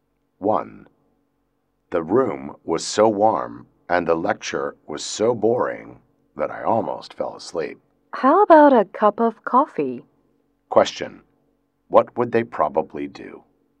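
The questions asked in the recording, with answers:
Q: What would they probably do?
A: Have a cup of coffee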